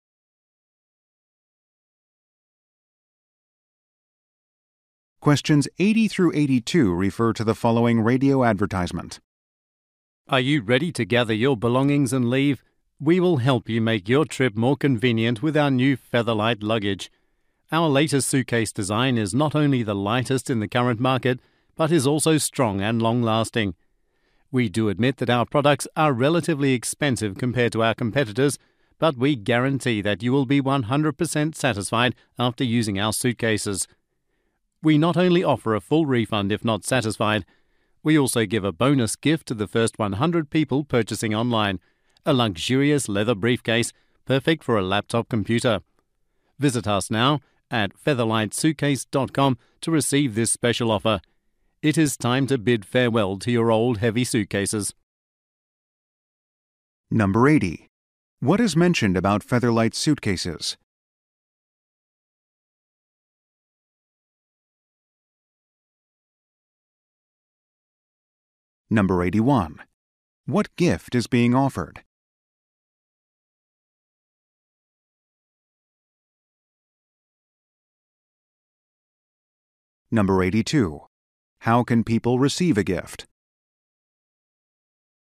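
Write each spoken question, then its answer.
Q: What is mentioned about Featherlight suitcases?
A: They are the lightest on the market and strong

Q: What gift is being offered?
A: A leather briefcase

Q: How can people receive a gift?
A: By being among the first 100 to buy online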